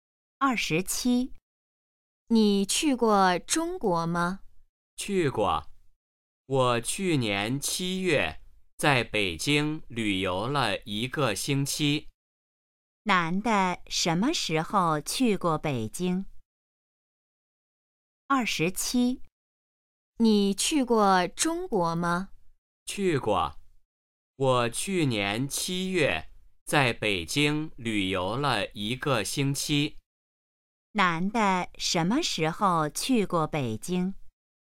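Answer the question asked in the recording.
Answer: 去年7月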